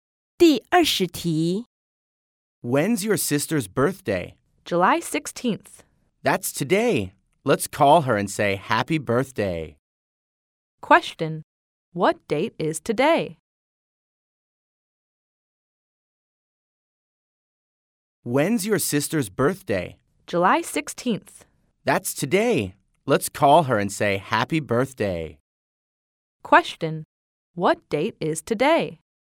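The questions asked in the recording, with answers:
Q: What date is today?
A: July 16th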